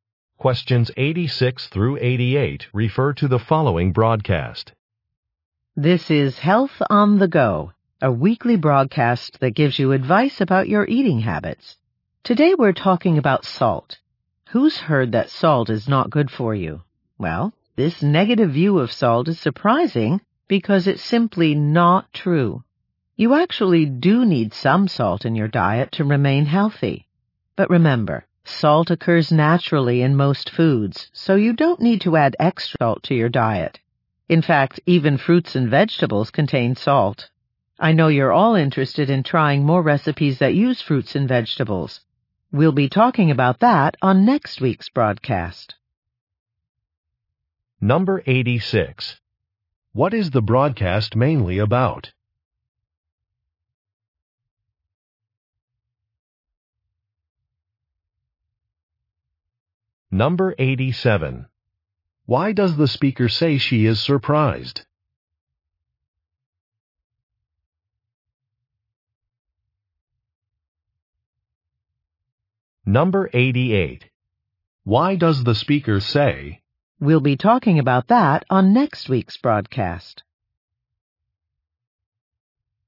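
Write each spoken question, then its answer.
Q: What is the broadcast mainly about?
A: Salt in the diet

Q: Why does the speaker say she is surprised?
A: The negative view of salt is not true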